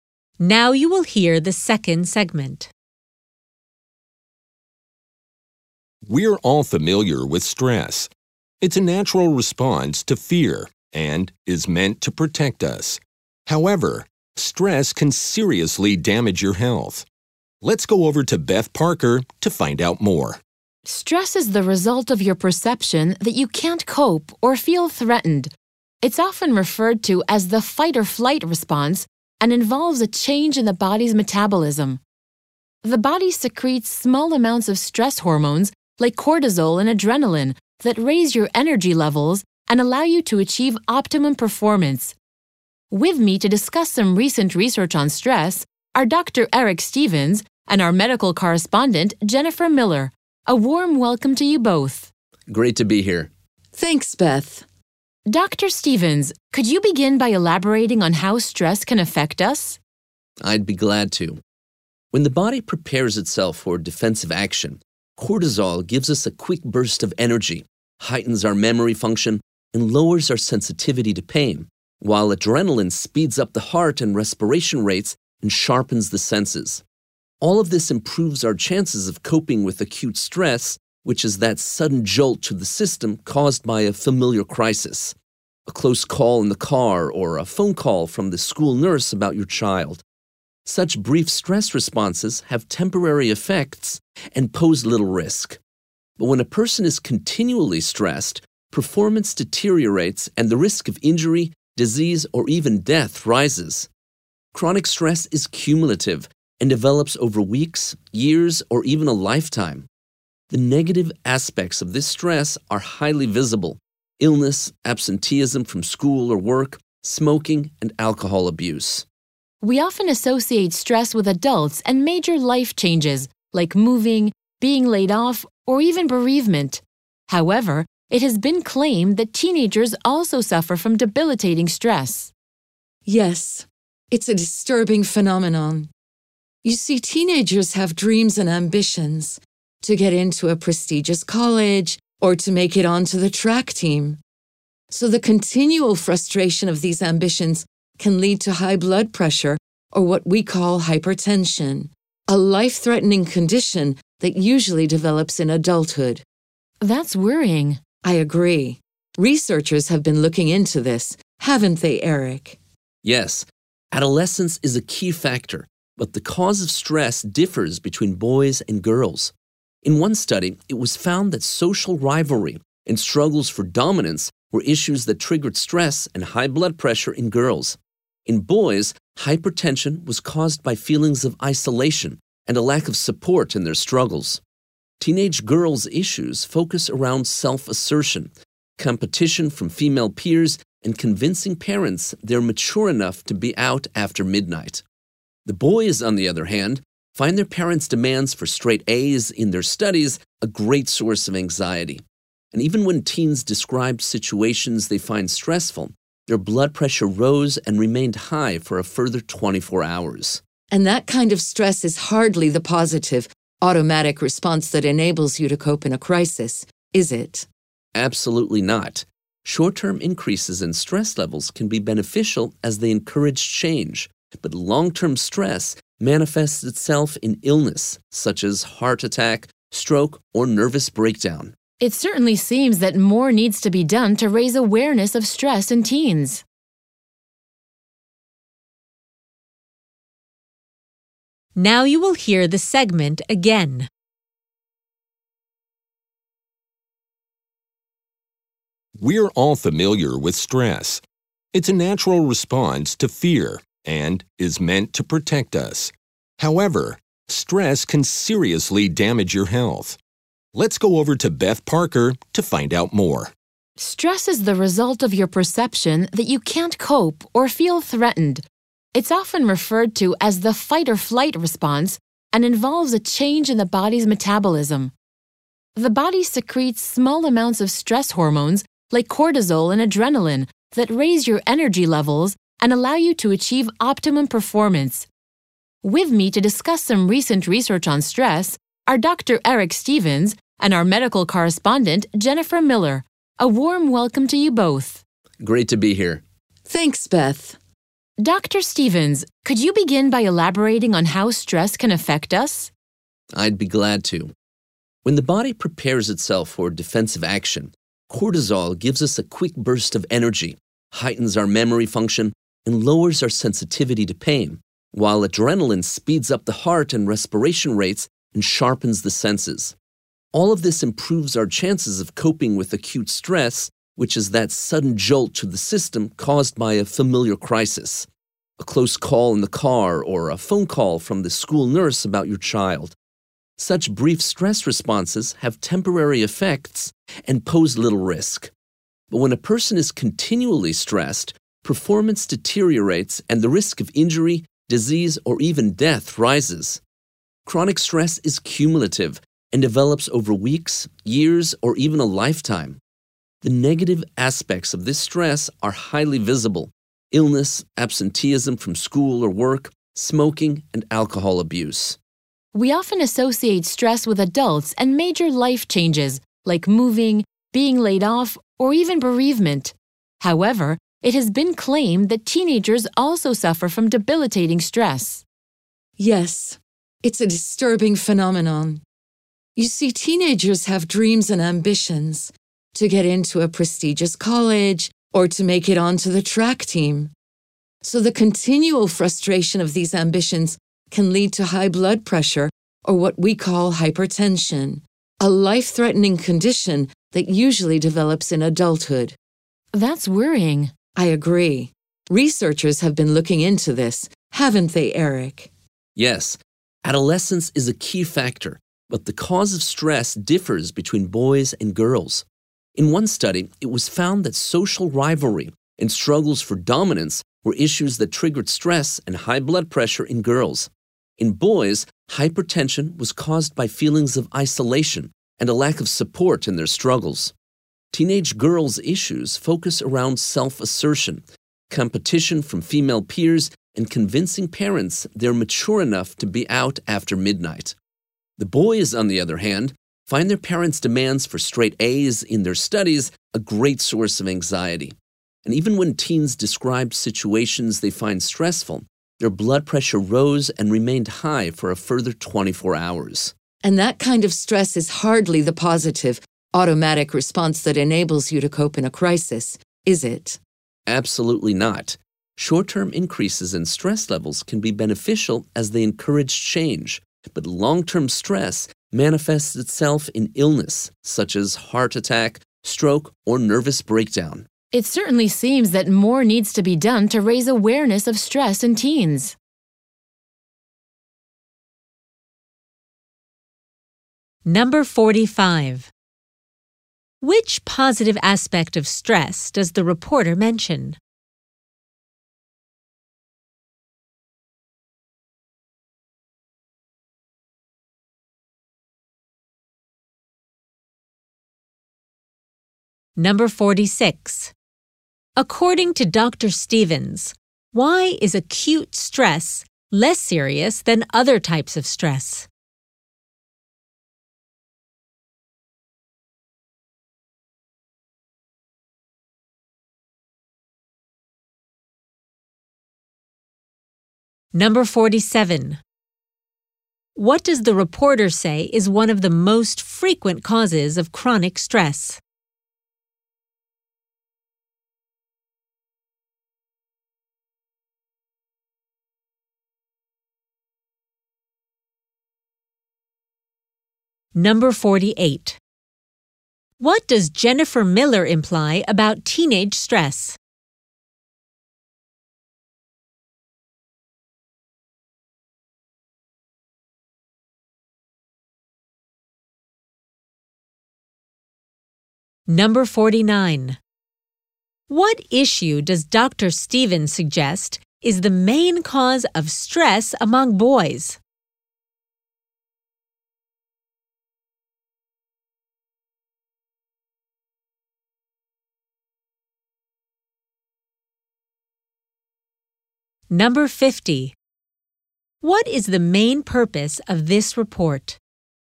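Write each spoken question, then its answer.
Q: Which positive aspect of stress does the reporter mention?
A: Stress hormones raise energy levels for optimum performance

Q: Stevens, why is acute stress less serious than other types of stress?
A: It is brief and its effects are temporary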